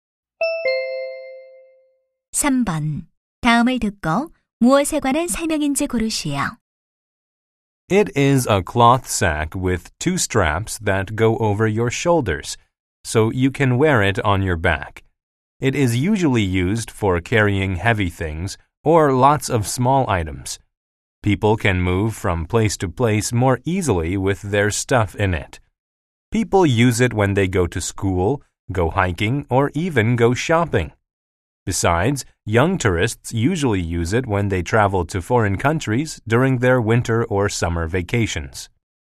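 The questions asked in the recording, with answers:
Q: 다음을 듣고 무엇에 관한 설명인지 고르시오.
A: 배낭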